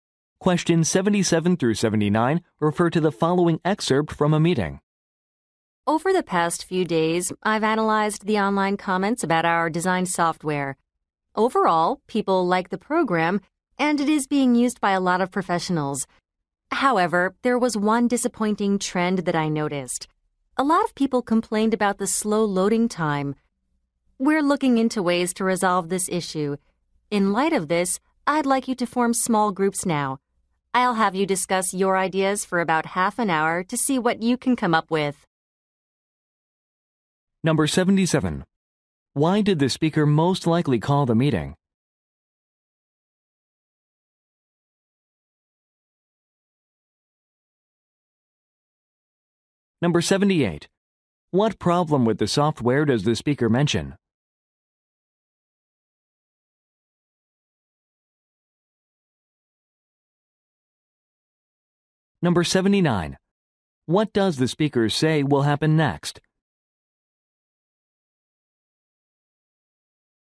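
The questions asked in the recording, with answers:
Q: Why did the speaker most likely call the meeting?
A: To discuss customer feedback on the software

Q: What problem with the software does the speaker mention?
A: Slow loading time

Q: What does the speaker say will happen next?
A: Listeners will discuss ideas in small groups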